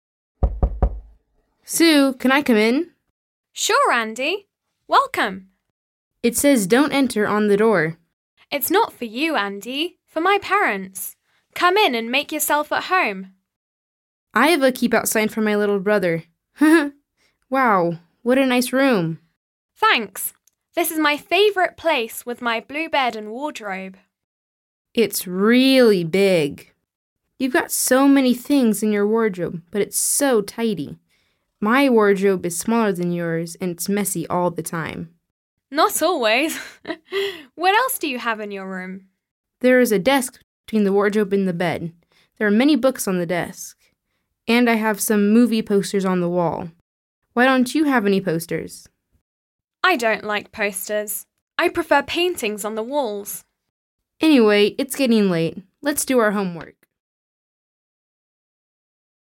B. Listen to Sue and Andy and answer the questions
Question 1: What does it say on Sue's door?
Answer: DON'T ENTER

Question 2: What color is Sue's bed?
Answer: BLUE

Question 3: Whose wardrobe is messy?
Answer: ANDY'S

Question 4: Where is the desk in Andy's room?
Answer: BETWEEN THE WARDROBE AND THE BED

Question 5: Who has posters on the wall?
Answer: ANDY

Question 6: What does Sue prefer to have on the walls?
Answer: PAINTINGS

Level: 9. sınıf